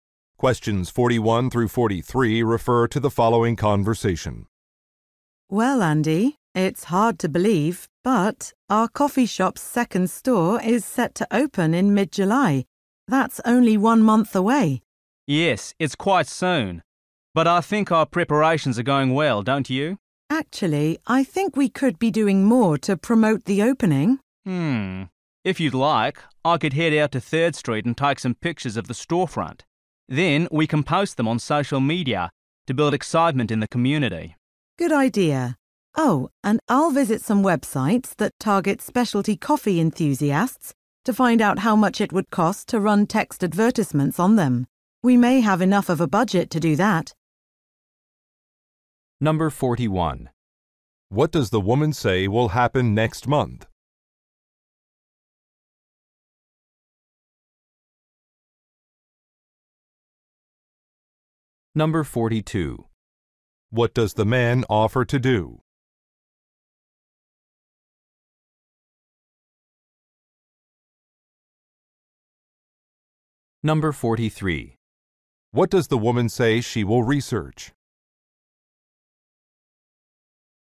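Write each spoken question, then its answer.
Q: What does the woman say will happen next month?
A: The coffee shop's second store will open.

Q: What does the man offer to do?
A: Take pictures of the storefront.

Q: What does the woman say she will research?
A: The cost of advertising on specialty coffee websites.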